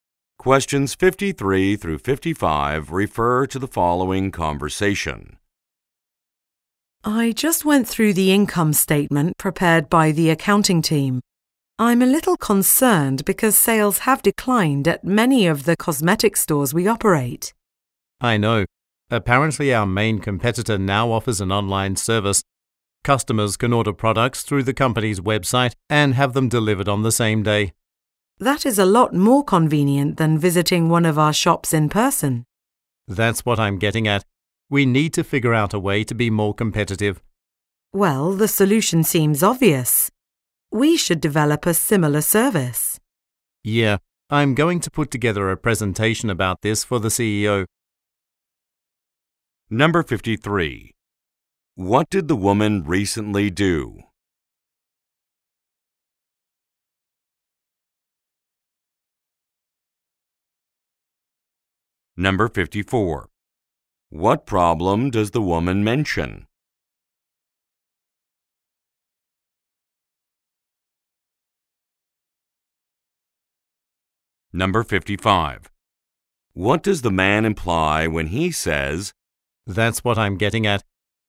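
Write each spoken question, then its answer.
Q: What did the woman recently do?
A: Reviewed the income statement

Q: What problem does the woman mention?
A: Sales have declined at their stores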